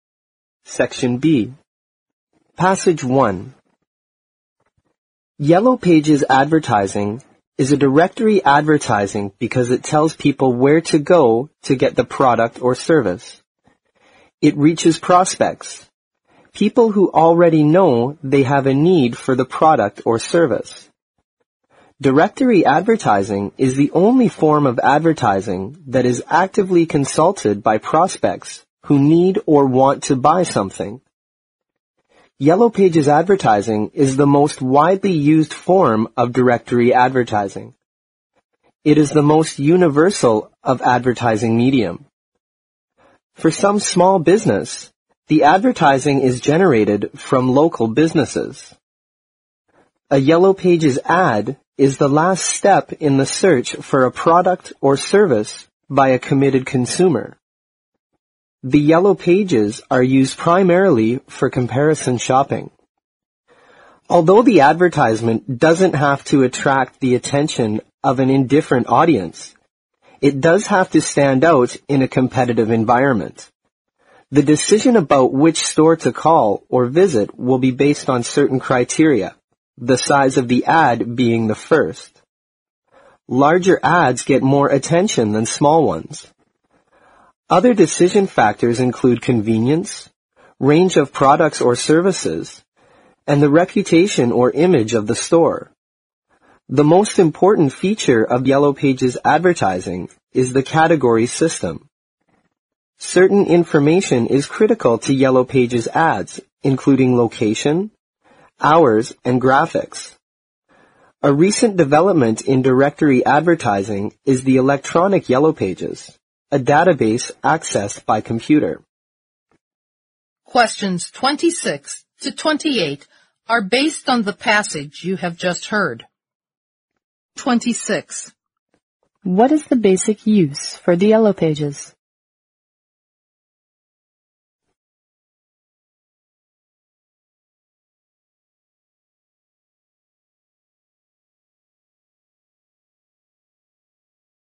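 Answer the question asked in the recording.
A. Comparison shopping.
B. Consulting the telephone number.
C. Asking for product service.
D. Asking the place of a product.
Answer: A. Comparison shopping.

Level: 四级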